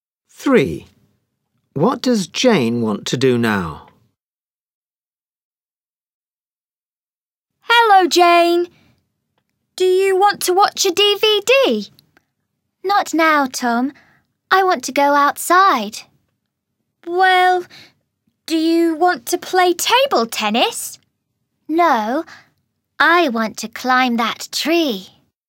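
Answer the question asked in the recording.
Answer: Climb that tree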